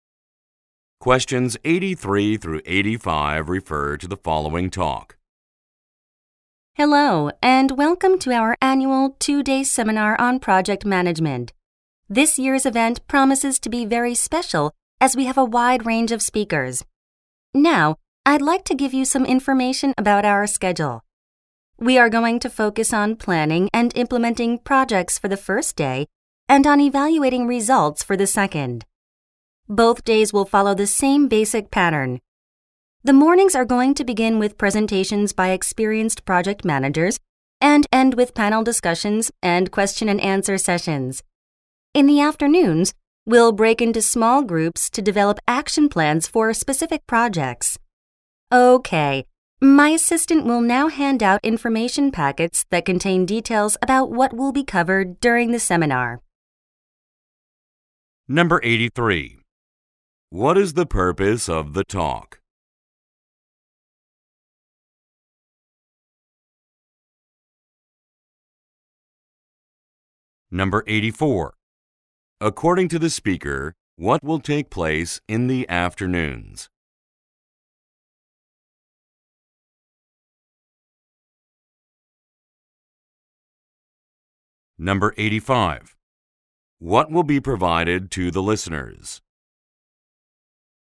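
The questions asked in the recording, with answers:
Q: What is the purpose of the talk?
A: To explain the seminar schedule

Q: According to the speaker, what will take place in the afternoons?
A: Small group work to develop action plans

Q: What will be provided to the listeners?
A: Information packets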